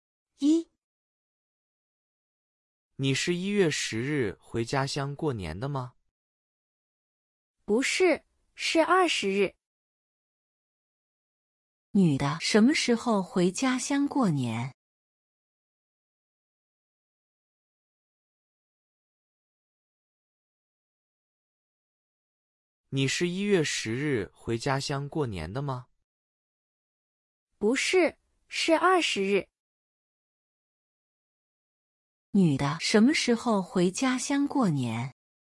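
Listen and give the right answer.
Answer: 1月20日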